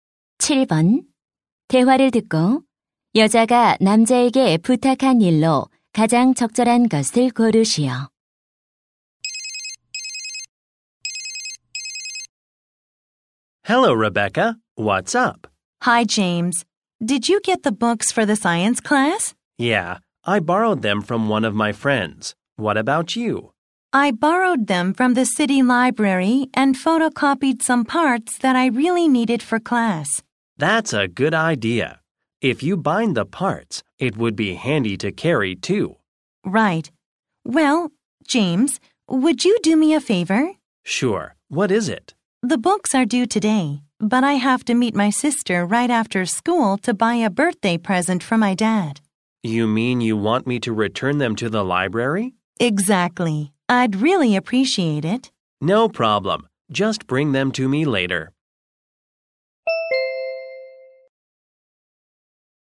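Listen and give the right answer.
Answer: 도서관에 책 반납하기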